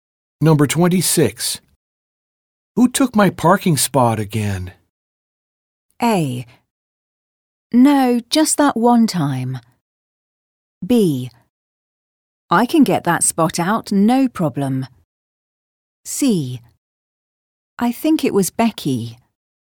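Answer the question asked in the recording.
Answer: C: I think it was Becky.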